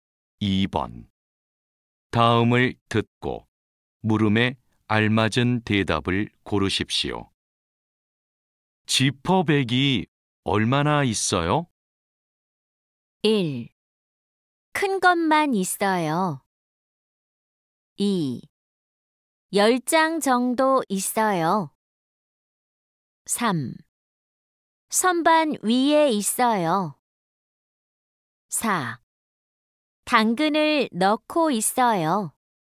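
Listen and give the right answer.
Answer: 2: 10장 정도 있어요.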